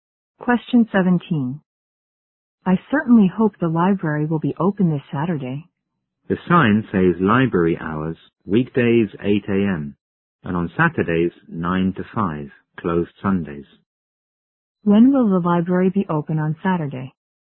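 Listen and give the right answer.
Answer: From 9 to 5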